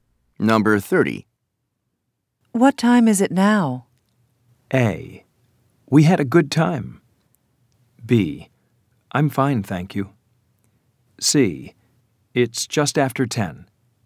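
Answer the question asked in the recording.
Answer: C: It's just after 10.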